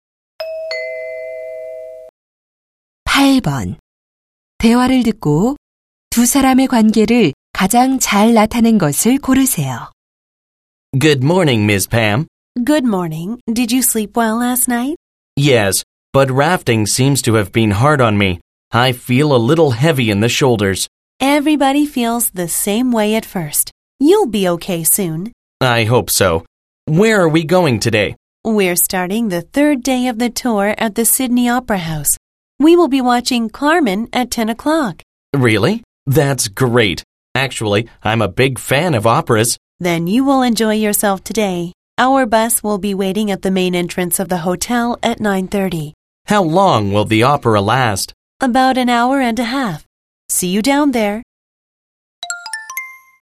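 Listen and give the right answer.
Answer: 여행 가이드와 관광객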